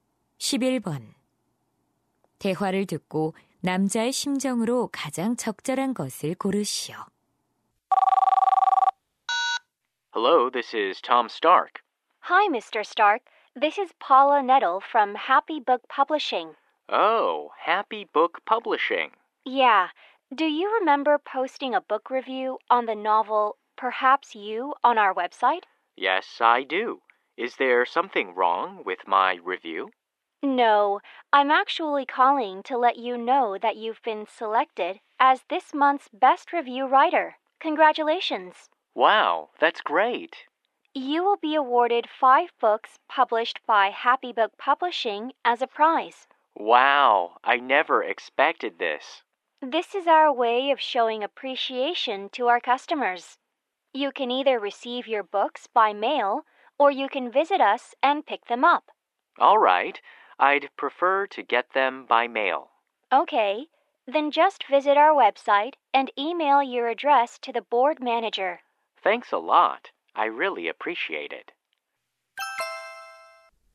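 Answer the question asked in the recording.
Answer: 기쁘고 감사함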